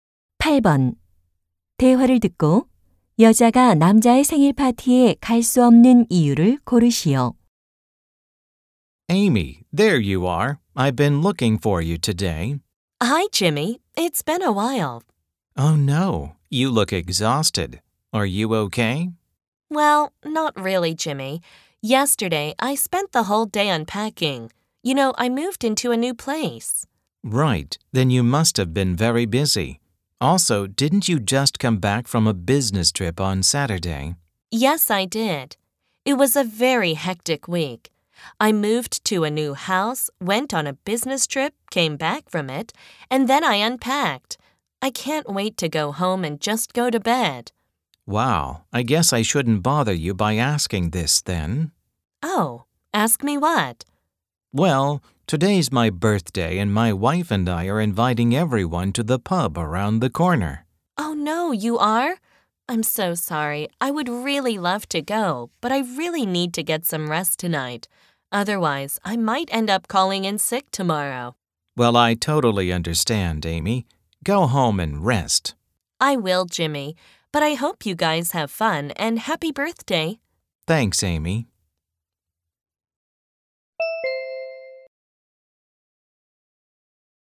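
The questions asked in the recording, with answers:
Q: 대화를 듣고 여자가 남자의 생일 파티에 갈 수 없는 이유를 고르시오.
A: 너무 피곤해서 쉬어야 하기 때문에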